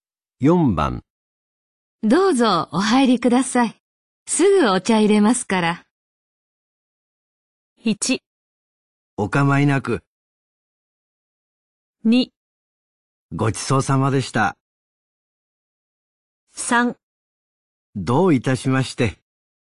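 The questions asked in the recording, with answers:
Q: どうぞお入りください。すぐお茶入れますから。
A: 1: お構いなく。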